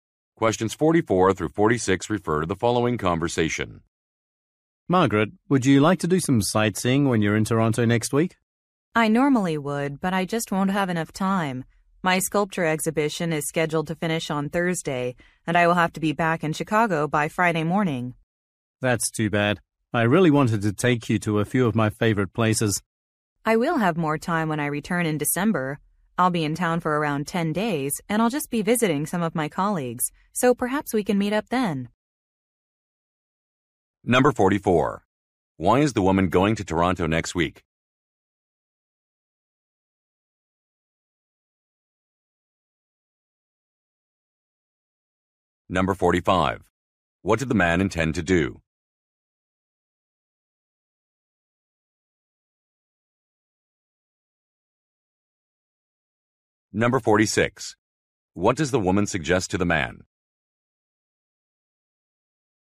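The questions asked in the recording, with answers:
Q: Why is the woman going to Toronto next week?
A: For her sculpture exhibition

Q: What did the man intend to do?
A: Take her to some of his favorite places

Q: What does the woman suggest to the man?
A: Meeting up in December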